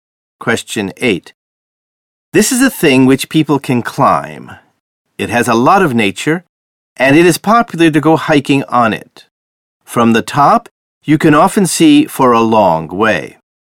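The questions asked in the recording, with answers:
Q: This is a thing which people can climb.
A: A mountain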